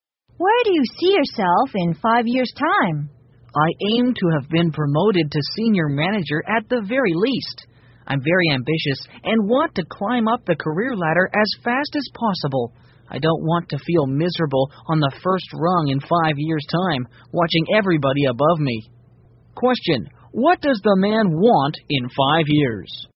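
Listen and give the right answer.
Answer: To be promoted to senior manager at least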